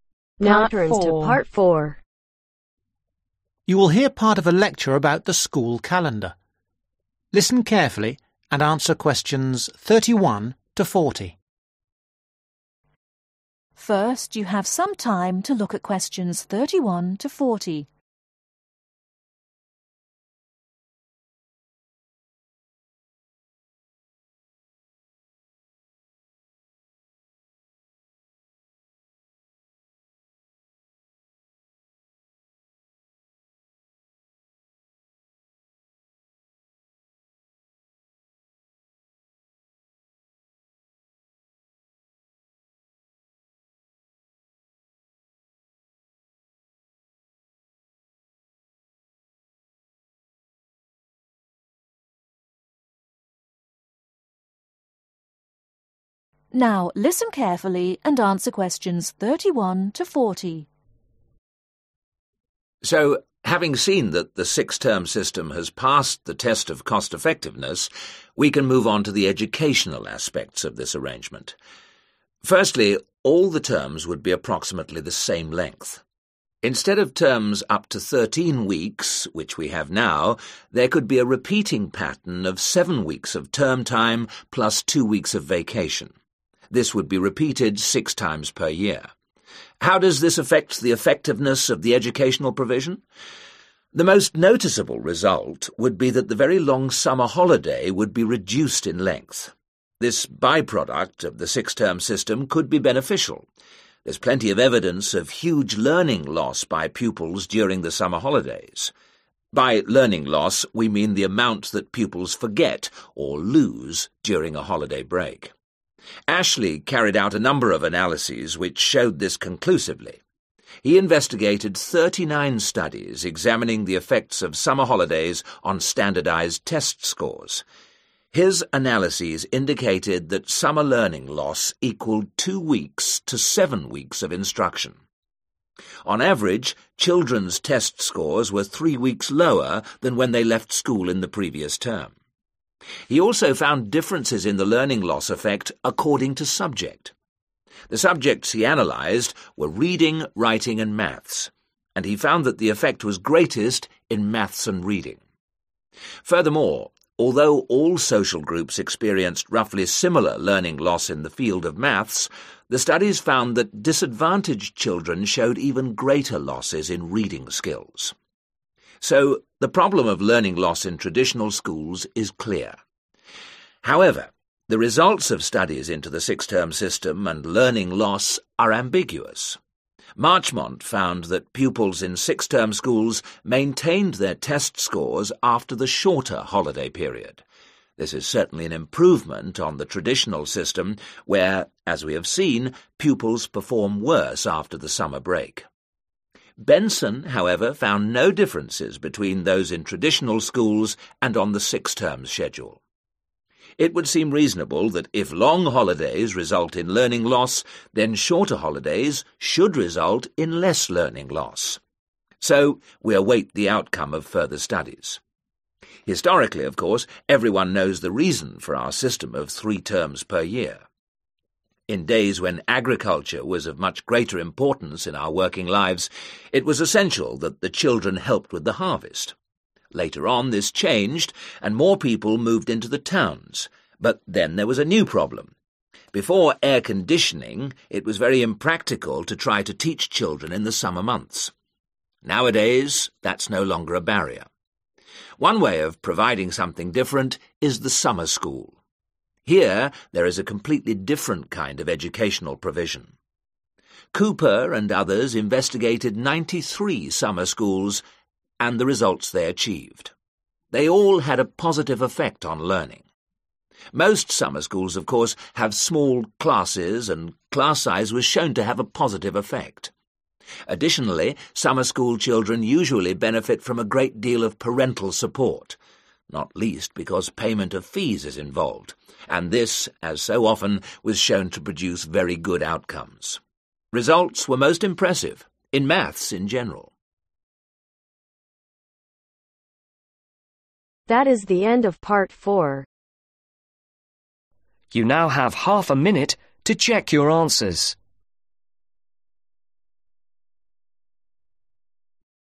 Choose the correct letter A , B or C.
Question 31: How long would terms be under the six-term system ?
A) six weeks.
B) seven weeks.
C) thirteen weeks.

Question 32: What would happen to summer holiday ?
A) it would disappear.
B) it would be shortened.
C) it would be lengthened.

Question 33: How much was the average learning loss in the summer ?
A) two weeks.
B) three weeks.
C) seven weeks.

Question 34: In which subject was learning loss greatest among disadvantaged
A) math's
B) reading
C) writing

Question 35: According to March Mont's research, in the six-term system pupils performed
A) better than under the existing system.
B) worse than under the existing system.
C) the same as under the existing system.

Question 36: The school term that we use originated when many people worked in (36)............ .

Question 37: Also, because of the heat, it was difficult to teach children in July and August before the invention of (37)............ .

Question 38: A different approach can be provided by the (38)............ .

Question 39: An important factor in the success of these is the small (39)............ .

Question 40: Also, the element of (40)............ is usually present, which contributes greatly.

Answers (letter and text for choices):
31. B) seven weeks.
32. B) it would be shortened.
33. B) three weeks.
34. B) reading
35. A) better than under the existing system.
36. Agriculture
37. Air Conditioning
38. Summer School
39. Class Size
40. Parental Support